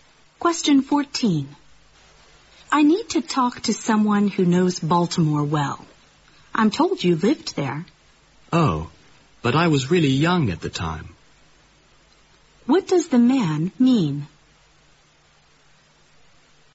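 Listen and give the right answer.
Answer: He may not know Baltimore well because he was very young when he lived there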